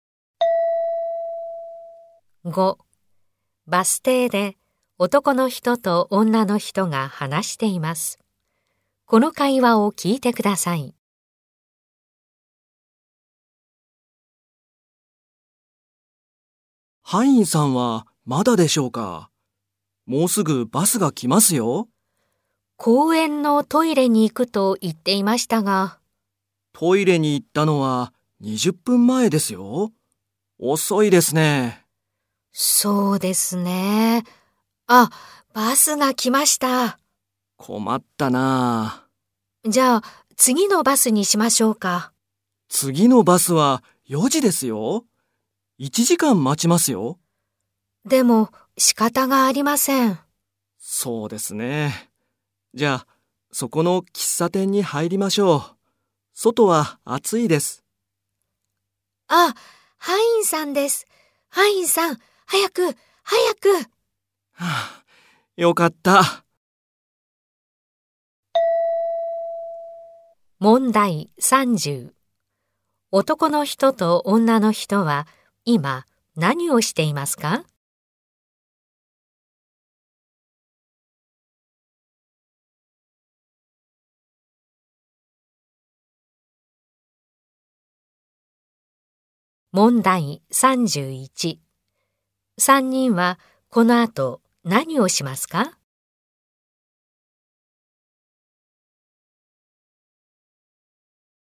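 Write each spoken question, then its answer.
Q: 男の人と女の人は今何をしていますか?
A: バス停でハインさんを待っています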